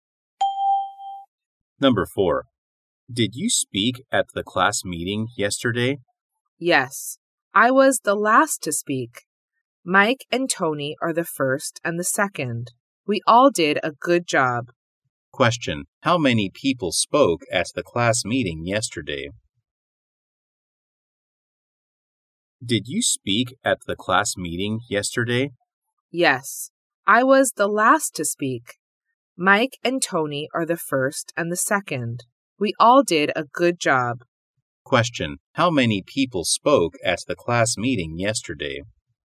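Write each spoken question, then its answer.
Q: How many people spoke at the class meeting yesterday?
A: Three.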